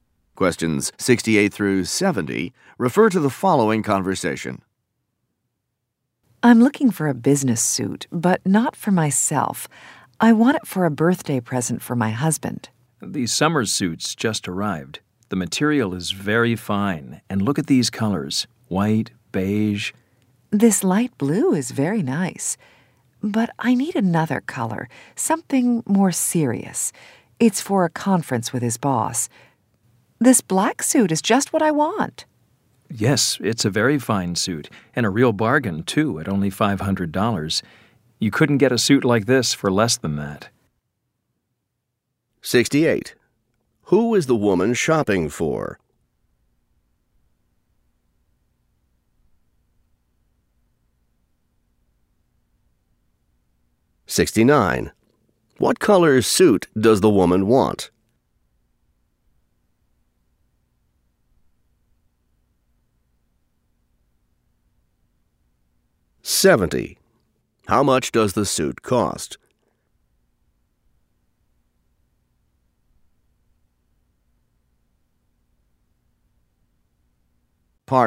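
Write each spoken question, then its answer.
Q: Who is the woman shopping for?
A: Her husband

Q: What color suit does the woman want?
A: Black

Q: How much does the suit cost?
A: $500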